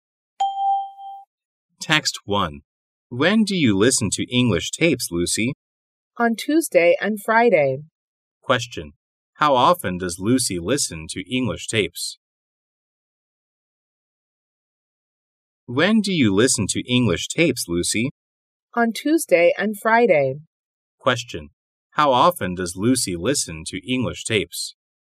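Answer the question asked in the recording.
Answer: Twice a week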